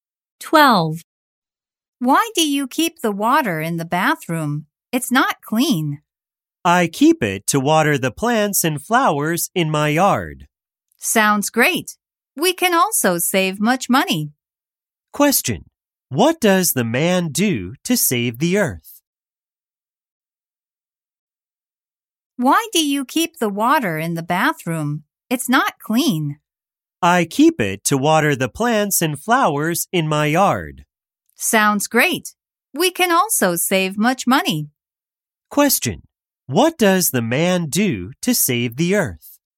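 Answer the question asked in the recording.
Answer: He keeps the bathroom water to water the plants and flowers in his yard.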